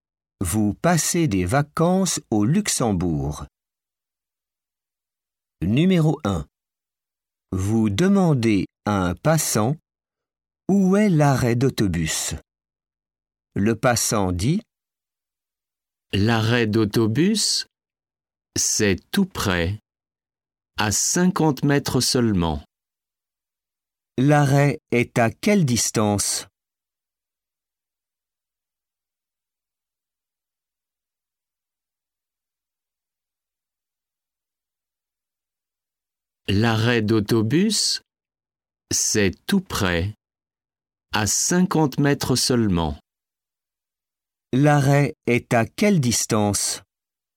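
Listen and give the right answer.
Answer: À 50 mètres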